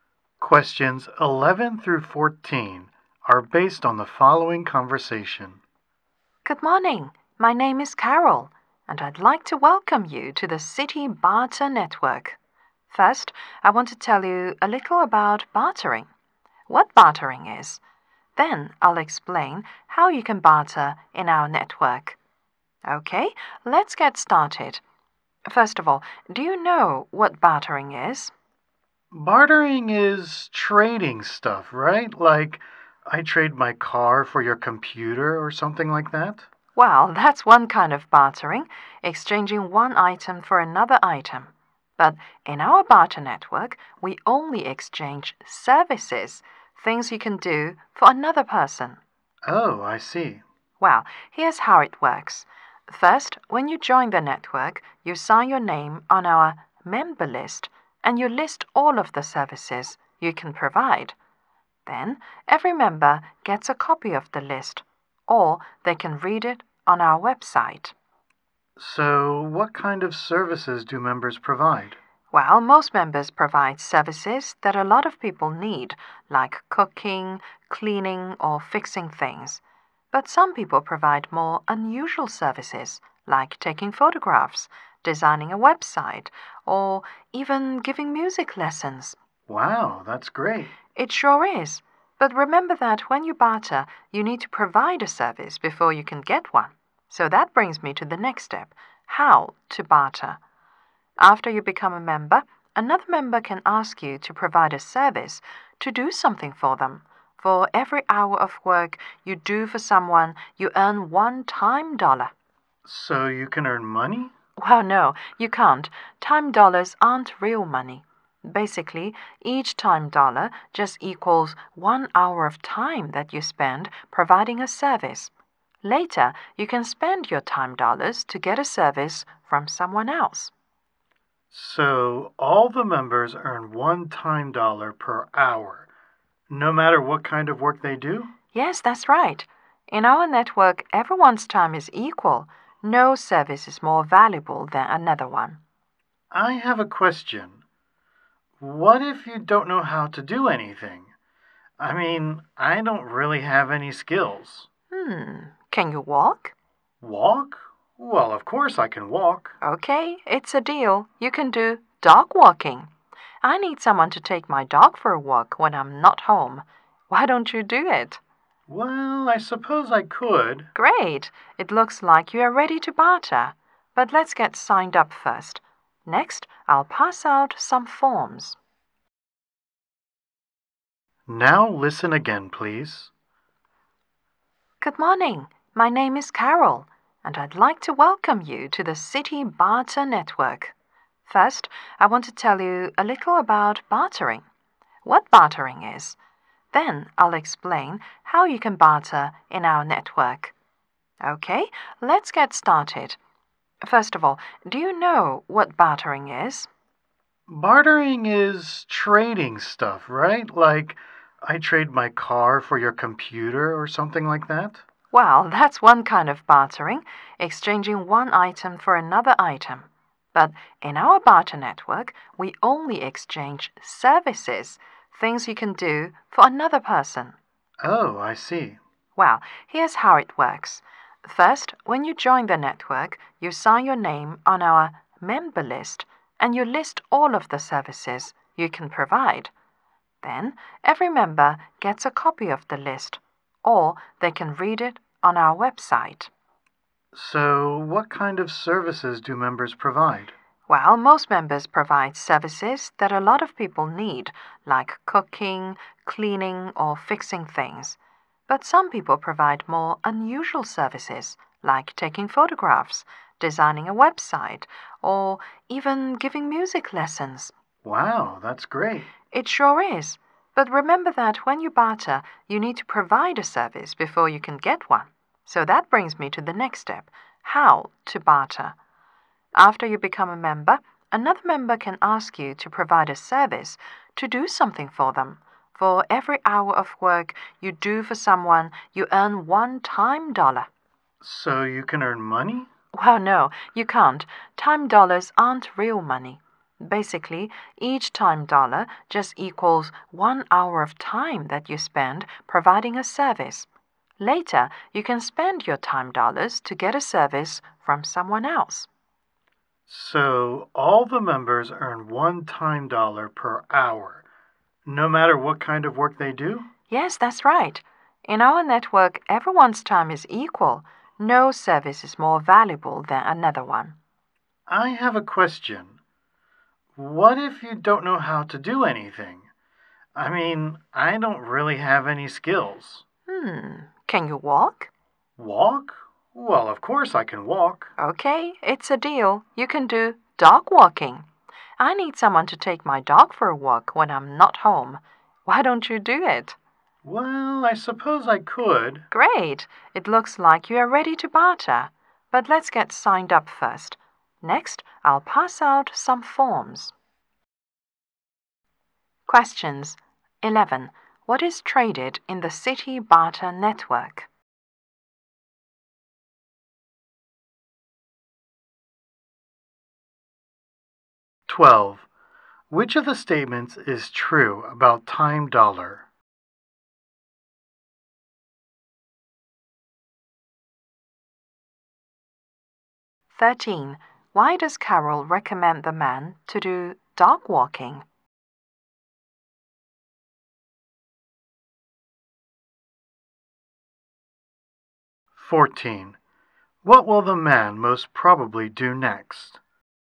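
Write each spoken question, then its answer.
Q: What is traded in the City Barter Network?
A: Services

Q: Which of the statements is true about time dollar?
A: One time dollar equals one hour of service; it isn't real money

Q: Why does Carol recommend the man to do dog walking?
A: He says he has no skills, but he can walk

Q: What will the man most probably do next?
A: Sign up and fill in forms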